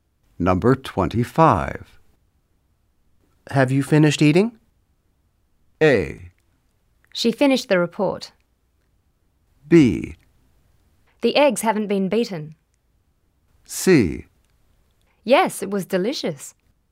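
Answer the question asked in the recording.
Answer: C: Yes, it was delicious.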